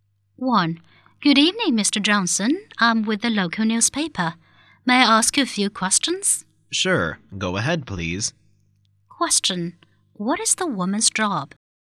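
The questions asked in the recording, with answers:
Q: What is the woman's job?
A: She is a newspaper reporter.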